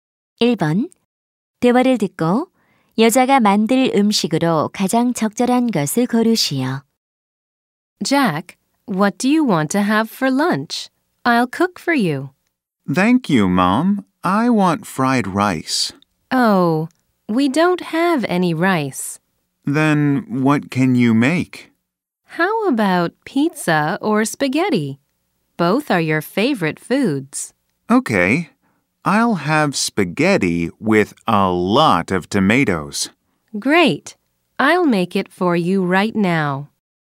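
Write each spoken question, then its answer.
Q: 대화를 듣고 여자가 만들 음식으로 가장 적절한 것을 고르시오.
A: 스파게티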